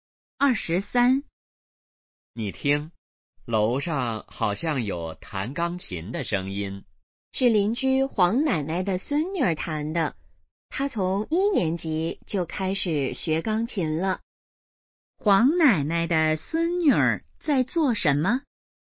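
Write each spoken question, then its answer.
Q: 黄奶奶的孙女儿在做什么?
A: 弹钢琴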